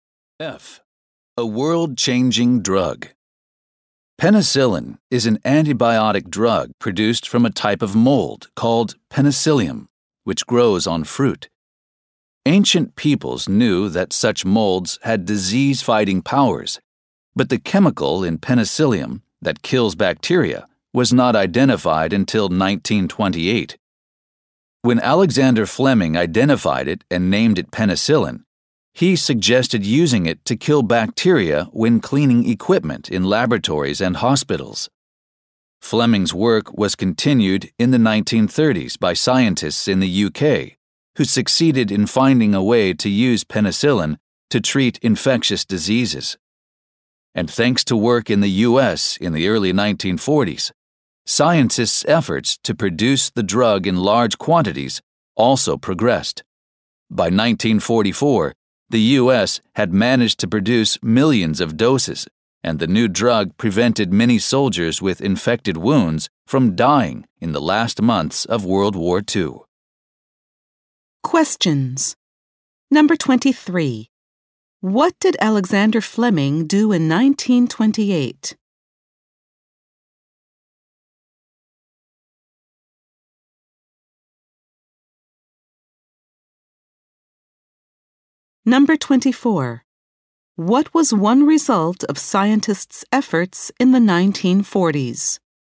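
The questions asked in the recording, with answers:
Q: What did Alexander Fleming do in 1928?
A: He identified and named penicillin

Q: What was one result of scientists' efforts in the 1940s?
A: Penicillin was mass-produced and saved many soldiers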